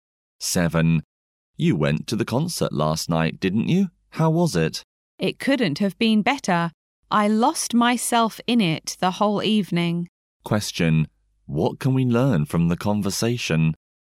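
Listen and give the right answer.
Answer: The speaker enjoyed the concert very much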